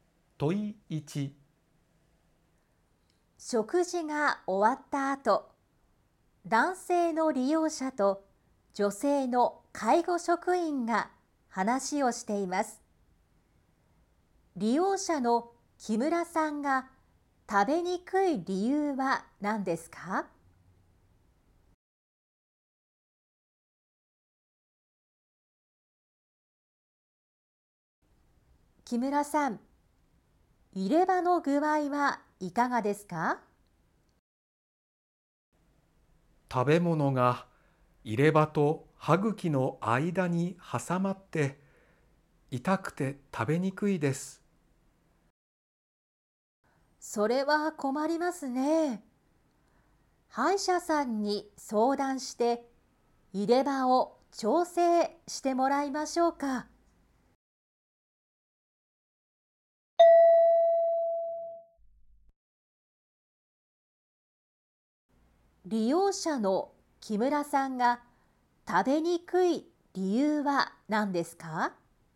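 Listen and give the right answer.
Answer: 食べ物が入れ歯と歯茎の間に挟まって痛いから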